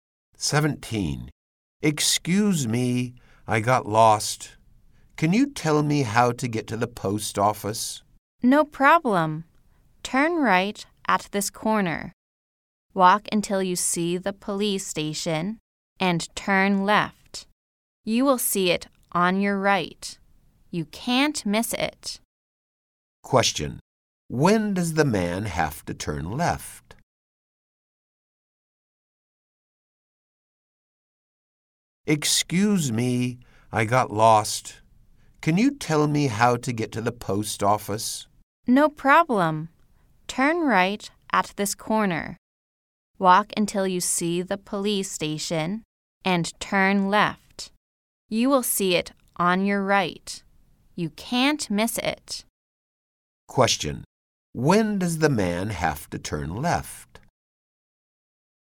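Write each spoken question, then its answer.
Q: Question. When does the man have to turn left?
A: When he sees the police station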